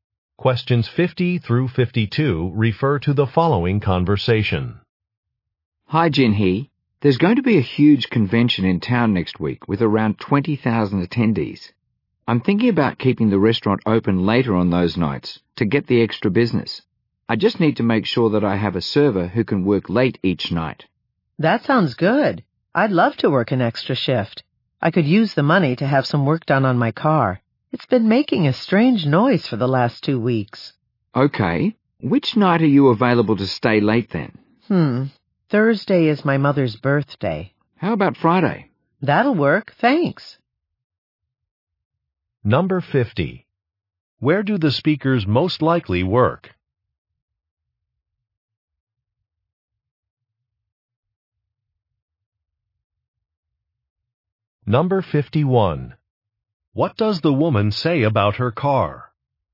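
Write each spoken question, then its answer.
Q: Where do the speakers most likely work?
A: At a restaurant

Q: What does the woman say about her car?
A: It has been making a strange noise and needs work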